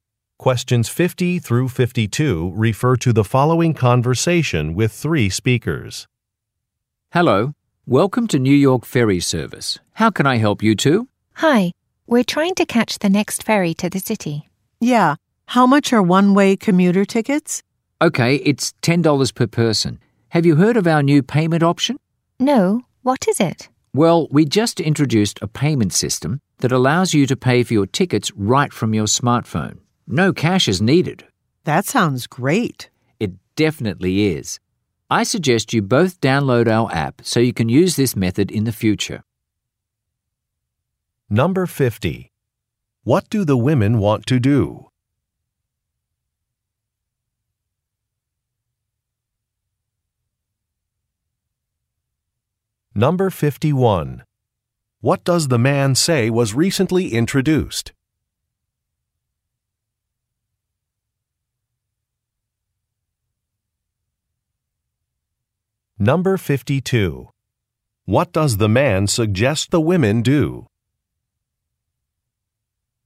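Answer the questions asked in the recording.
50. Catch the next ferry to the city
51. A payment system for paying for tickets with a smartphone
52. Download the app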